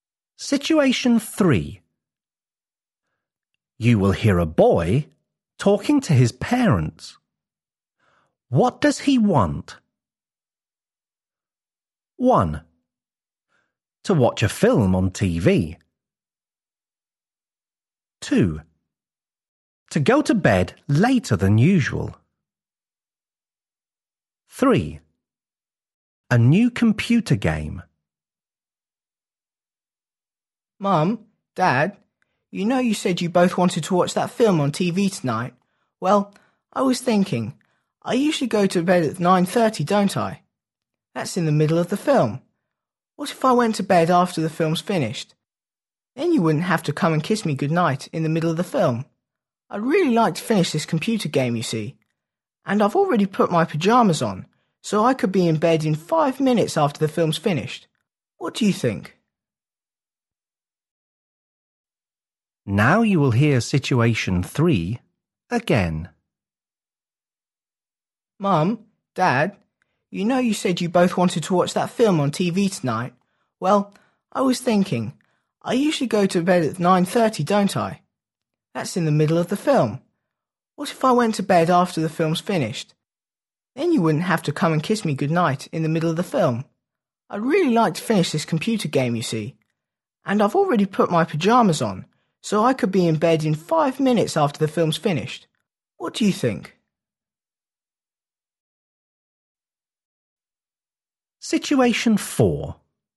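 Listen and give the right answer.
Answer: 2: To go to bed later than usual.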